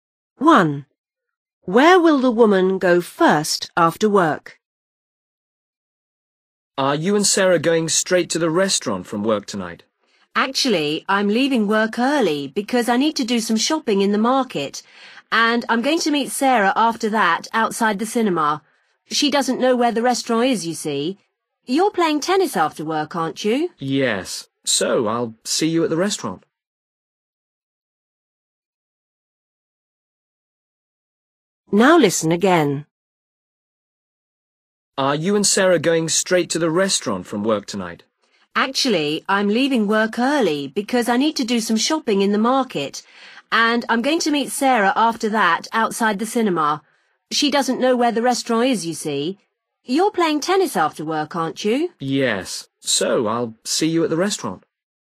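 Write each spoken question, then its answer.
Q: Where will the woman go first after work?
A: The market (to do some shopping)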